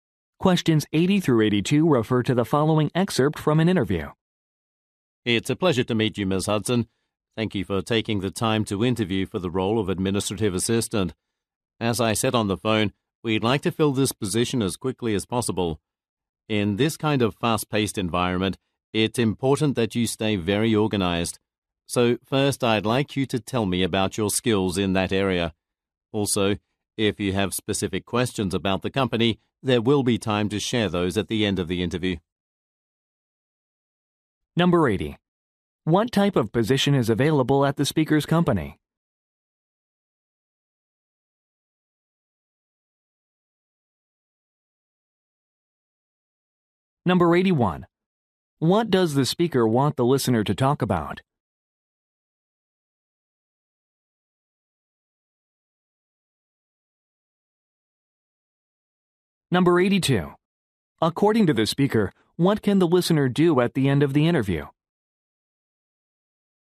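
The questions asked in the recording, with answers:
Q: What type of position is available at the speaker's company?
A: Administrative assistant

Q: What does the speaker want the listener to talk about?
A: Her organizational skills

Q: According to the speaker, what can the listener do at the end of the interview?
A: Ask questions about the company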